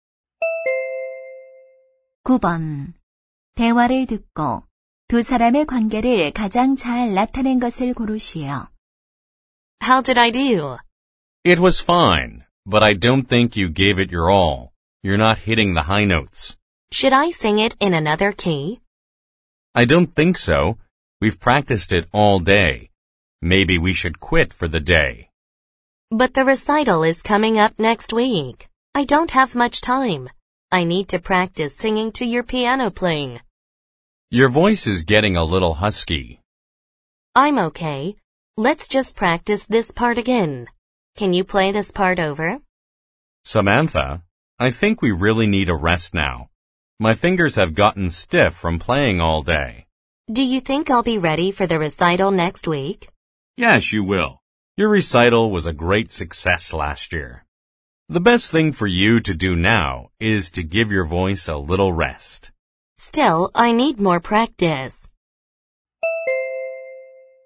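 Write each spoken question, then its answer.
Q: 대화를 듣고 두 사람의 관계를 가장 잘 나타낸 것을 고르시오.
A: 성악가와 피아노 반주자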